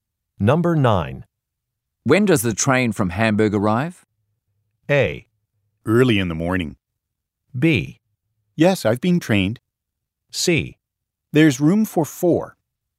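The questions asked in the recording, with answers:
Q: When does the train from Hamburg arrive?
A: A: Early in the morning.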